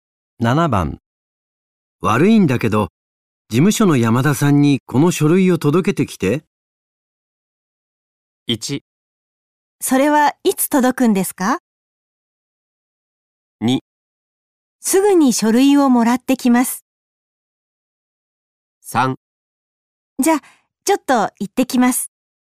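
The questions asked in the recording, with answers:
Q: 悪いんだけど、事務所の山田さんにこの書類を届けてきて。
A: 3: じゃあ、ちょっと行ってきます。

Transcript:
1
それはいつ届くんですか。
2
すぐに書類をもらってきます。
3
じゃあ、ちょっと行ってきます。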